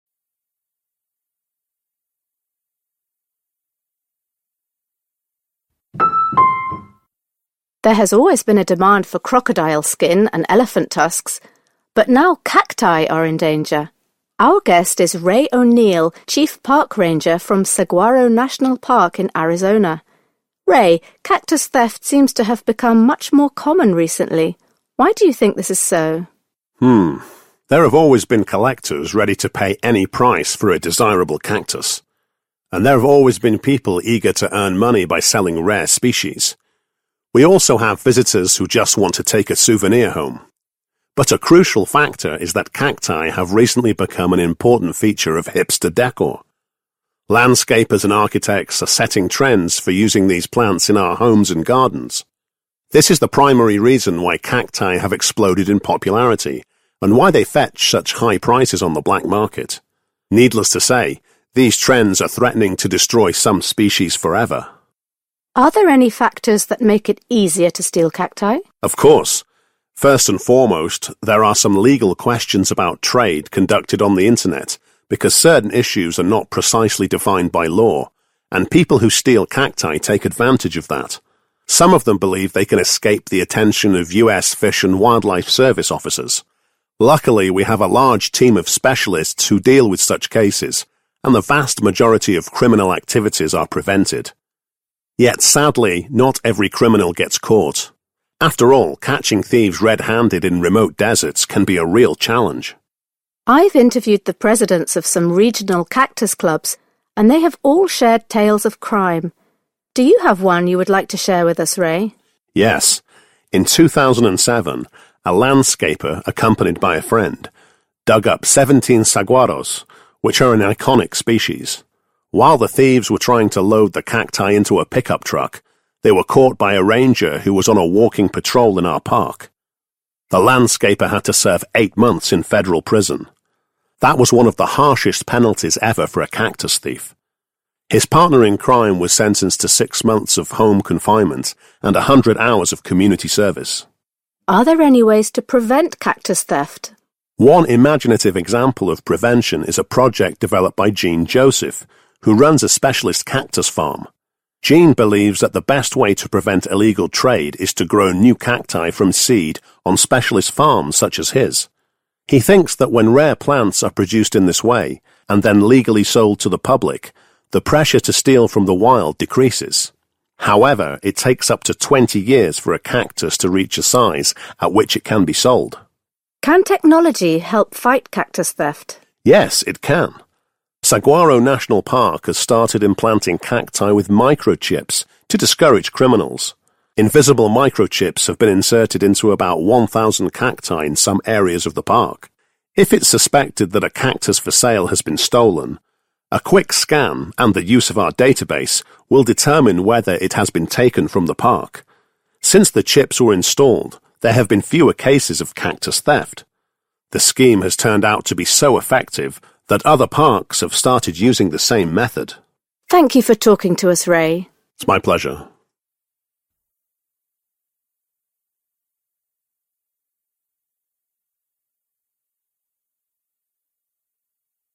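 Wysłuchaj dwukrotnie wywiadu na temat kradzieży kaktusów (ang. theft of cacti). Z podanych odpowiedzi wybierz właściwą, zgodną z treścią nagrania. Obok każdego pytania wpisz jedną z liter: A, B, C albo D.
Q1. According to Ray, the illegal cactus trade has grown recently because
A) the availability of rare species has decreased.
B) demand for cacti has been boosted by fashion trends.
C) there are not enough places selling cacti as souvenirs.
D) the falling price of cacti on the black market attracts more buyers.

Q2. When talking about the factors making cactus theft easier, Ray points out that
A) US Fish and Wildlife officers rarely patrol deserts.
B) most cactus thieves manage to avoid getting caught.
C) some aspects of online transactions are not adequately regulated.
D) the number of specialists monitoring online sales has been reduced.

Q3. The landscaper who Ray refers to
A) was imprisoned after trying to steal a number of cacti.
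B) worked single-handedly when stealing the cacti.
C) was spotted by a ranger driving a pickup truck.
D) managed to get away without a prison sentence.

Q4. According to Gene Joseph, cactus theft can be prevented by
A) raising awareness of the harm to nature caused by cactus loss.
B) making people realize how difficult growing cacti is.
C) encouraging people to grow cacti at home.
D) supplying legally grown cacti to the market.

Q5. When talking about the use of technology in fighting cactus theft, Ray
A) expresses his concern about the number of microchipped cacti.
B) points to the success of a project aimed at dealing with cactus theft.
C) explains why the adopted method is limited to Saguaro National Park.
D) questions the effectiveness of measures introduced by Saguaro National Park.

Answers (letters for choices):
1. B
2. C
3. A
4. D
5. B

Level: matura rozszerzona 2022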